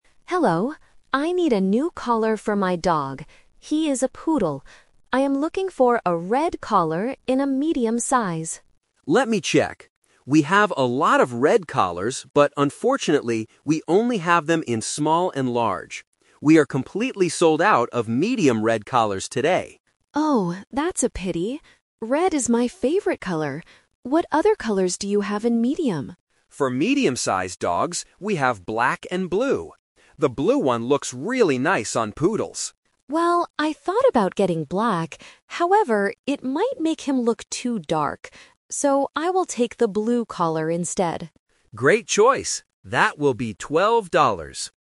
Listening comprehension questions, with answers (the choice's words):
Listen to the conversation between a customer and a shop assistant, and choose the correct answer (A, B, or C).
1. What did the customer want to buy at first?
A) A medium blue collar.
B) A medium red collar.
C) A large red collar.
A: A medium red collar.

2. Why couldn't the customer buy the red collar?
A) Because it was too expensive.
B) Because the shop didn't have the right size.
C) Because it didn't look good on her dog.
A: Because the shop didn't have the right size.

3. Which collar does the customer finally choose?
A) The black collar.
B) The red collar.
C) The blue collar.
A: The blue collar.

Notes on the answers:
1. The customer clearly says at the beginning, "I am looking for a red collar in a medium size." Option (A) is the trap; this is the collar she buys at the end, not what she wanted at first. Option (C) is a distractor because the shop has large red collars, but the customer didn't want a large one.
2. The assistant explains that they only have red collars "in small and large" and are "completely sold out of medium." Option (A) and (C) are plausible reasons in real life, but they are not mentioned in the audio.
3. The customer makes her final decision: "So, I will take the blue collar instead." Option (A) is the trap; she says she thought about getting black, but changed her mind because it would make her dog look too dark (The Twist). Option (B) is the trap of her original plan.

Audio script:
Customer: Hello. I need a new collar for my dog. He is a Poodle. I am looking for a red collar in a medium size.
Assistant: Let me check. We have a lot of red collars, but unfortunately, we only have them in small and large. We are completely sold out of medium red collars today.
Customer: Oh, that's a pity. Red is my favorite color. What other colors do you have in medium?
Assistant: For medium-sized dogs, we have black and blue. The blue one looks really nice on Poodles.
Customer: Well, I thought about getting black, however, it might make him look too dark. So, I will take the blue collar instead.